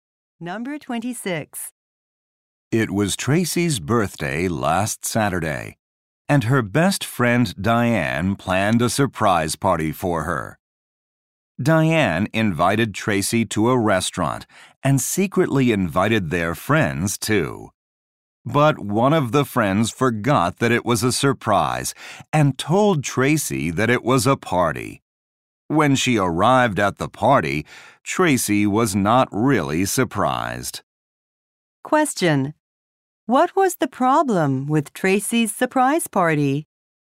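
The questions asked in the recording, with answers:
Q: What was the problem with Tracy's surprise party?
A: A friend told Tracy about it.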